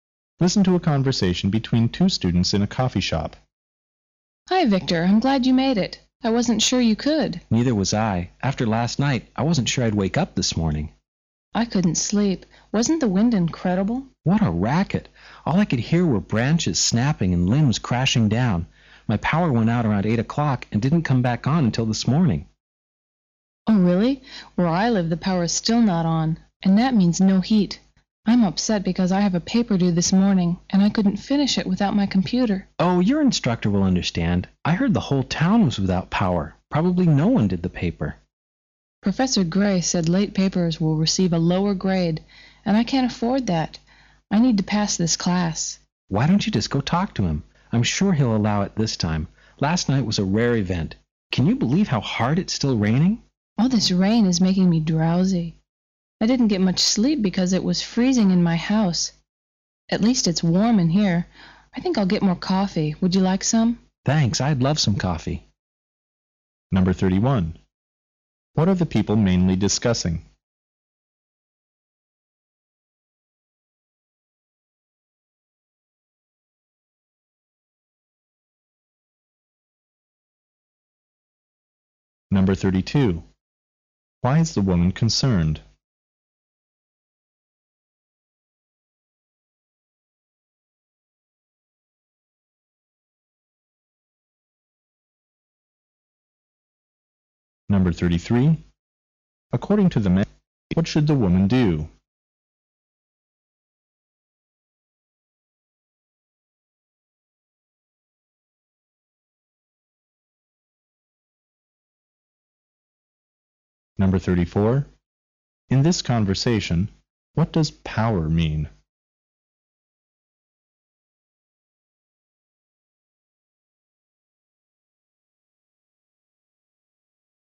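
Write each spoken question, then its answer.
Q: What are the people mainly discussing?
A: The storm last night and its effects, such as the power going out

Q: Why is the woman concerned?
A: She couldn't finish a paper due this morning because she had no power for her computer

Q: According to the man, what should the woman do?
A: Talk to Professor Gray

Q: In this conversation, what does power mean?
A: Electricity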